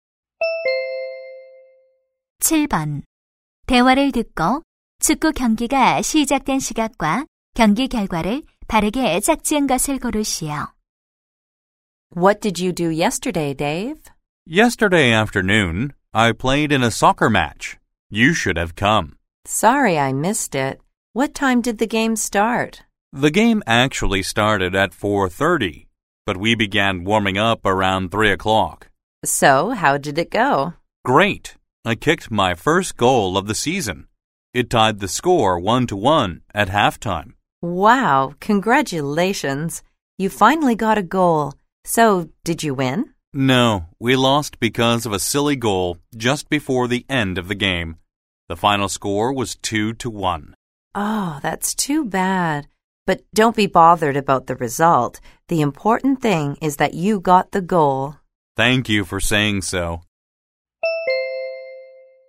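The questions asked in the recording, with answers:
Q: 대화를 듣고 축구 경기가 시작된 시각과 경기 결과를 바르게 짝지은 것을 고르시오.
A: 4시 30분, 2대 1 패배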